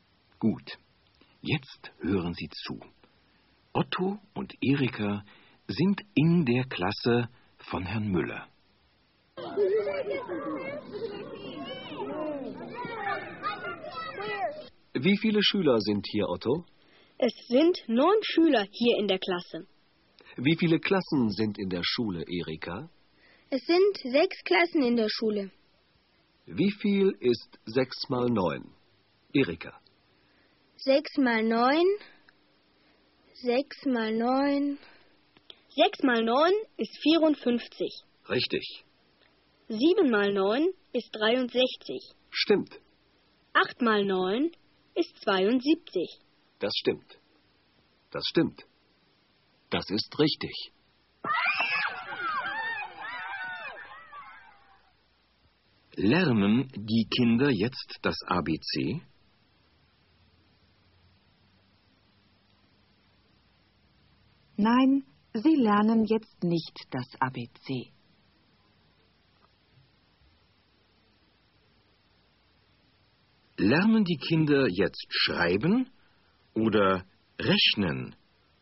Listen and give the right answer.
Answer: Sie lernen jetzt rechnen.